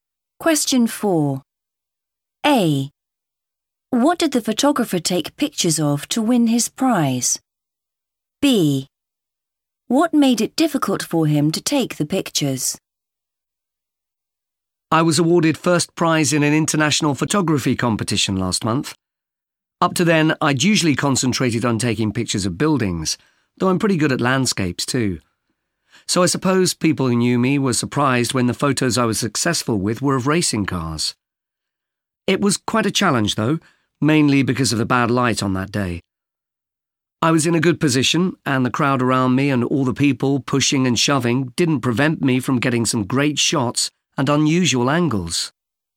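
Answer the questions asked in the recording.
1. racing cars
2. bad light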